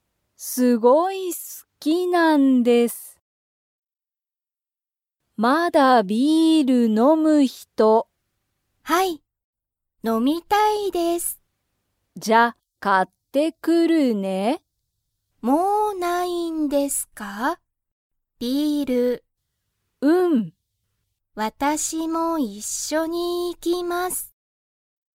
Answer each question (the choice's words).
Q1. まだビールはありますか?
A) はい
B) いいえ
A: いいえ

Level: Level 1